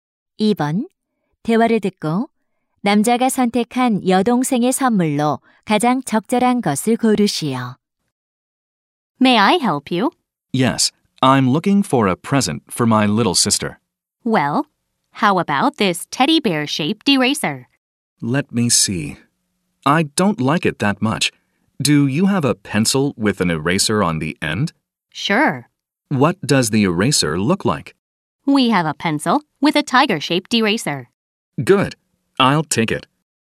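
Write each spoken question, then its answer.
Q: 대화를 듣고 남자가 선택한 여동생의 선물로 가장 적절한 것을 고르시오.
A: 호랑이 모양 지우개가 달린 연필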